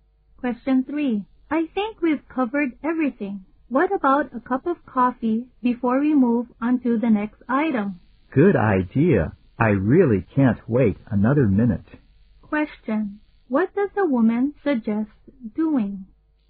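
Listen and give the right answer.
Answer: Having a coffee break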